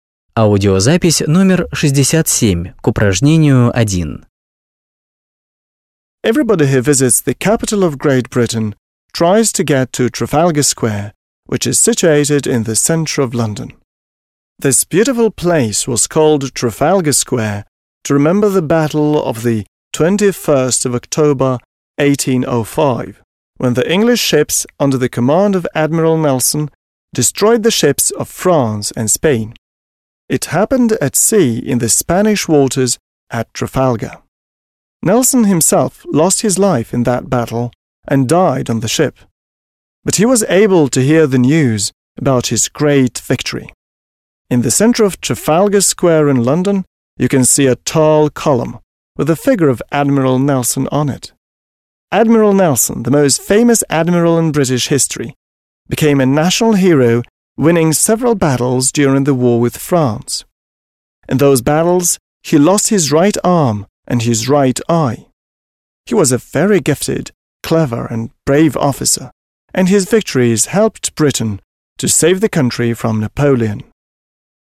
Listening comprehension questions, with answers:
1. Listen, (67), and say which facts are true, false or not stated.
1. Nelson's personal name is Horatio.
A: Not stated

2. Nelson was killed in 1805.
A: True

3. Nelson took part in the wars against France.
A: True

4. Nelson became captain of a ship at the age of twenty.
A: Not stated

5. Napoleon's army didn't come to Britain thanks to Nelson's victories.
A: True

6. In the wars Nelson lost his left hand and eye.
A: False

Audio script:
Everybody who visits the capital of Great Britain tries to get to Trafalgar Square which is situated in the centre of London. This beautiful place was called Trafalgar Square to remember the battle of the 21st of October 1805 when the English ships under Admiral Nelson destroyed the ships of France and Spain. It happened at sea in the Spanish waters at Trafalgar. Nelson himself lost his life in that battle and died on the ship. But he was able to hear the news about his great victory.
In the centre of Trafalgar Square in London you can see a tall column with a figure of Admiral Nelson on it. Admiral Nelson, the most famous admiral in British history, became a national hero winning several battles during the war with France. In those battles he lost his right arm and his right eye. He was a very gifted, clever and brace officer and his victories helped Britain to save the country from Napoleon.

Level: 8 класс